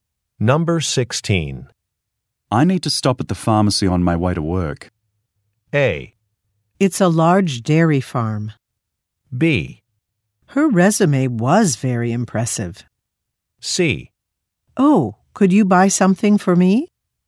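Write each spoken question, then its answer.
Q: I need to stop at the pharmacy on my way to work.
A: C: Oh, could you buy something for me?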